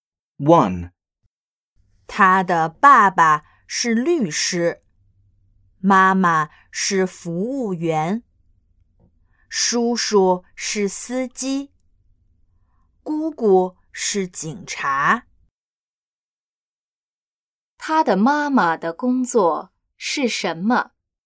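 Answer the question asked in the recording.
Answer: 服务员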